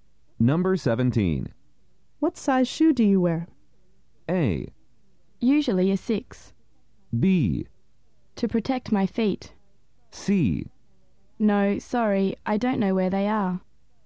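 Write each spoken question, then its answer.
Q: What size shoe do you wear?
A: A: Usually a 6.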